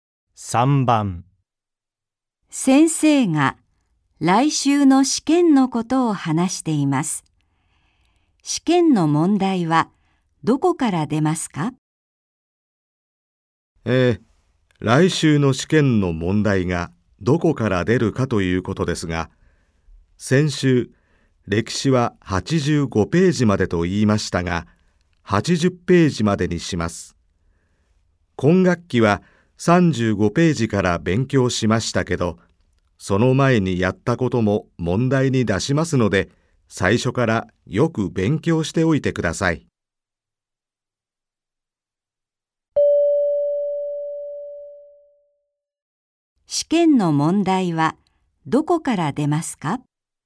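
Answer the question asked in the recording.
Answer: 最初から80ページまで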